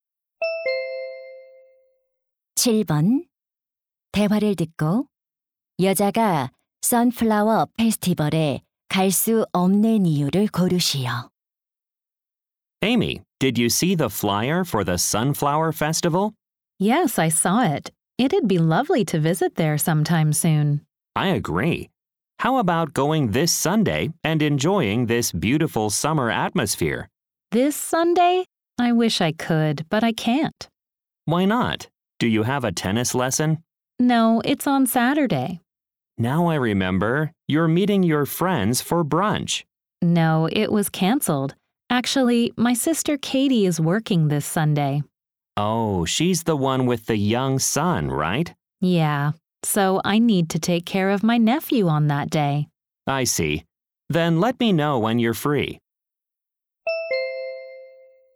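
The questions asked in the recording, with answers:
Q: 대화를 듣고 여자가 선플라워 페스티벌에 갈 수 없는 이유를 고르시오.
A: 조카를 돌봐야 해서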